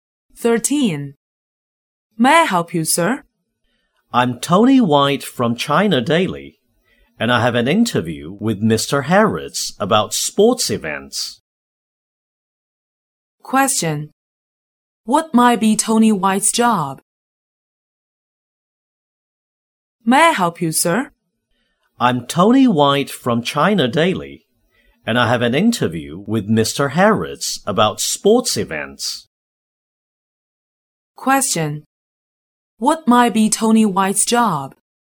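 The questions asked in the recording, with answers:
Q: What might be Tony White's job?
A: A reporter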